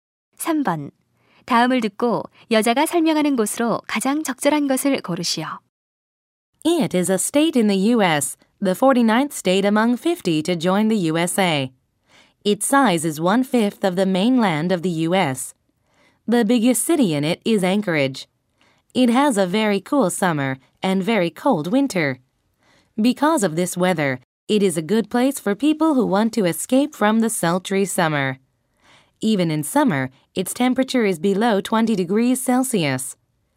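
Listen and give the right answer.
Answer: 알래스카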